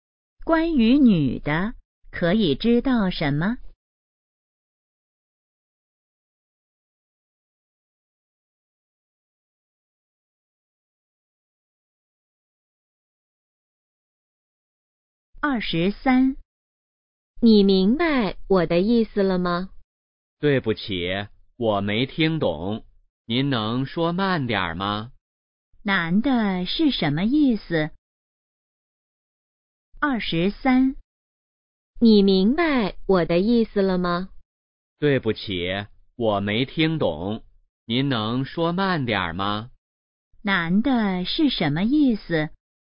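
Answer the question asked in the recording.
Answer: 没听懂,希望对方说慢点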